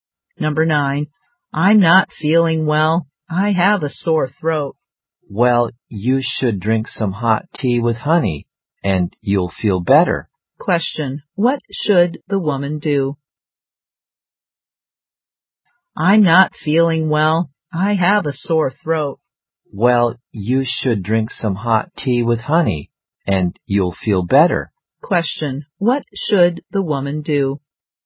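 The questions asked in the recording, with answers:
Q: Question, what should the woman do?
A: Drink some hot tea with honey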